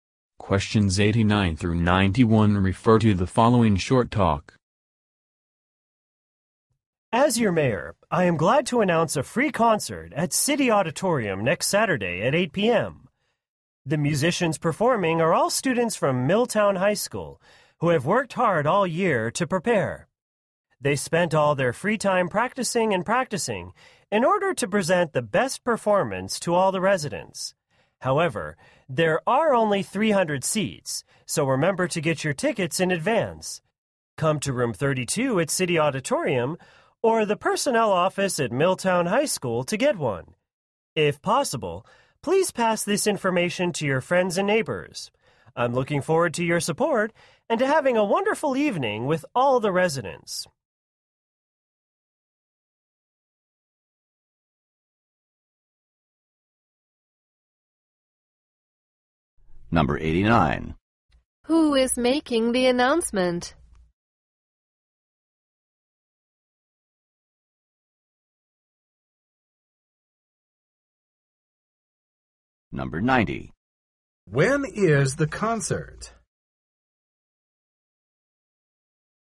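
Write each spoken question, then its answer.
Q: Who is making the announcement?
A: The mayor

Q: When is the concert?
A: Next Saturday at 8 p.m.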